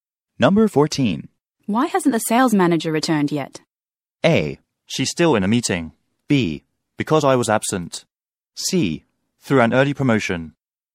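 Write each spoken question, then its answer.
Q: Why hasn't the sales manager returned yet?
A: A: She's still in a meeting.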